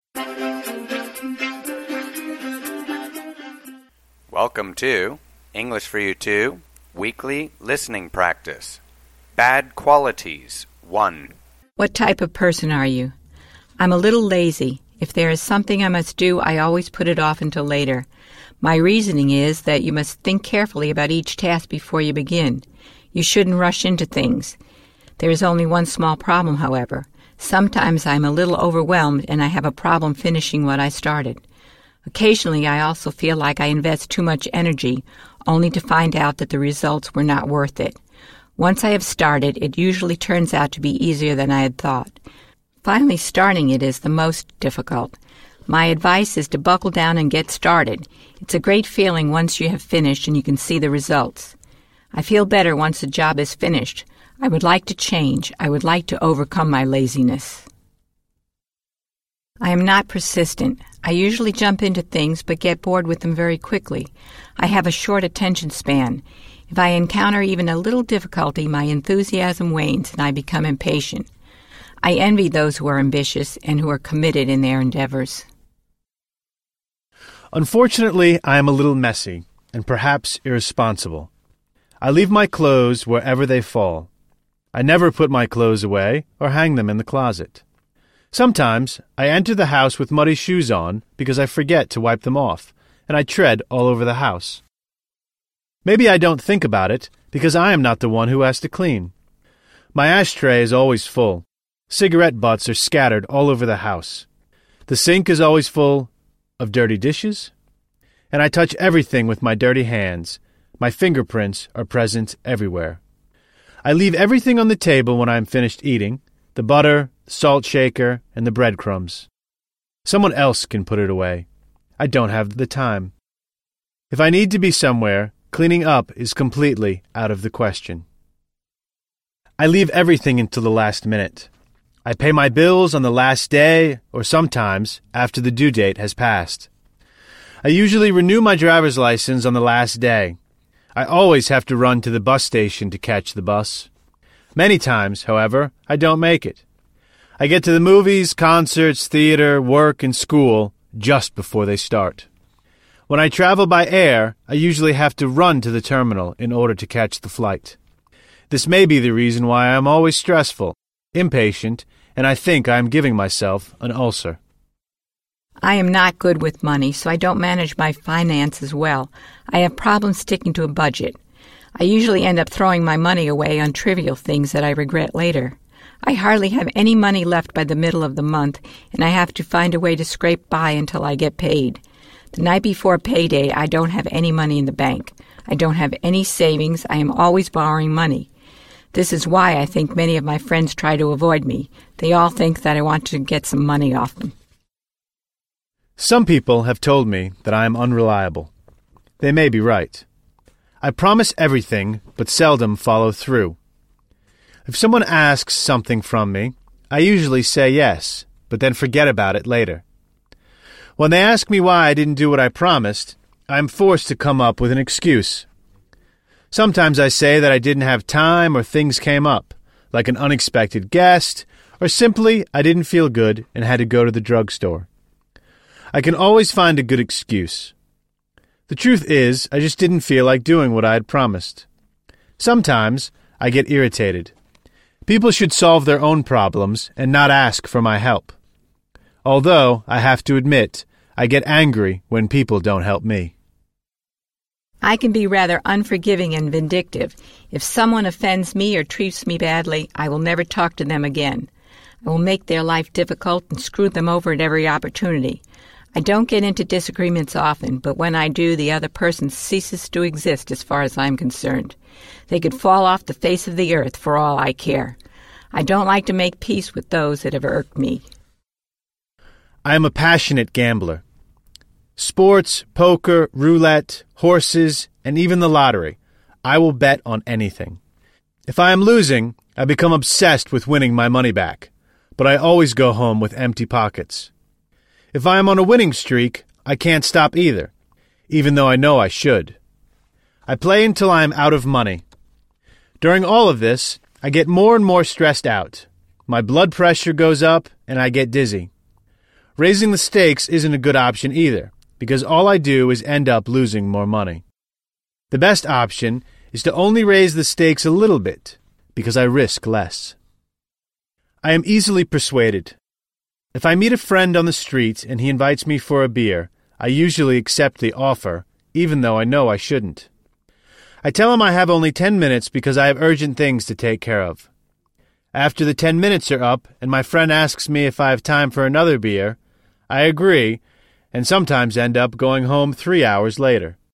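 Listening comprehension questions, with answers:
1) What does the speaker mean by – put it off?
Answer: To delay doing something until later.

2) What is the meaning of the word – overwhelmed?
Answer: Feeling that there is too much to deal with, so you have trouble finishing what you started.

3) What does the speaker mean by – buckle down?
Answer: To start working seriously and get started.

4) How do shoes become muddy?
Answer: By walking through mud outside and not wiping them off.

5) How would you define a vindictive person?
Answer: Someone who wants revenge and won't forgive people who offend them.

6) What does it mean to – screw someone over?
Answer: To treat someone unfairly and make their life difficult.

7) Why would someone wish another person to – fall off the face of the earth?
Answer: Because that person offended them, so they don't care about them anymore.

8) What is the meaning of – a winning streak?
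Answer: A period of winning many times in a row.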